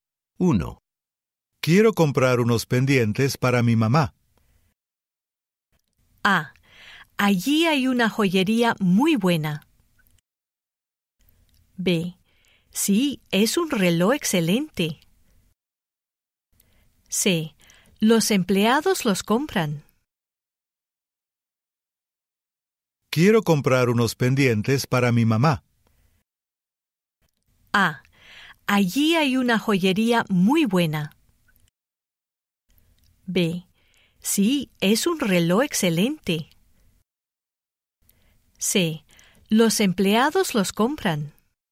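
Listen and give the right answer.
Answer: A: Allí hay una joyería muy buena.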